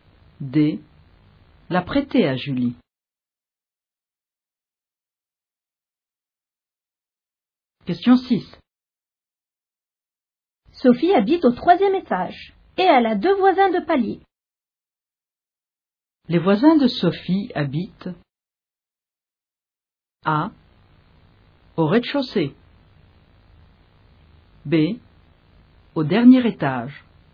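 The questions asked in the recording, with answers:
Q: Les voisins de Sophie habitent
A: C: Au même étage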